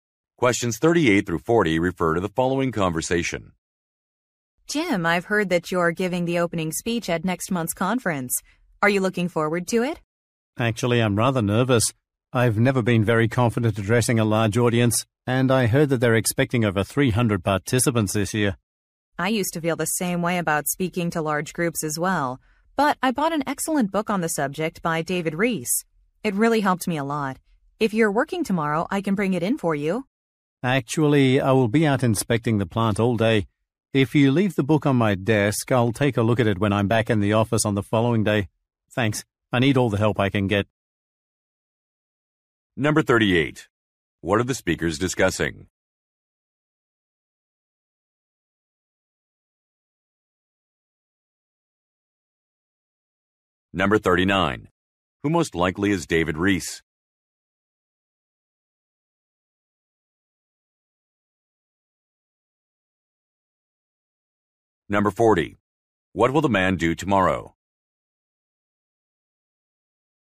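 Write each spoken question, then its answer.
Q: What are the speakers discussing?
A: The man's opening speech at a conference

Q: Who most likely is David Rees?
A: An author of a book on public speaking

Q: What will the man do tomorrow?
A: Inspect the plant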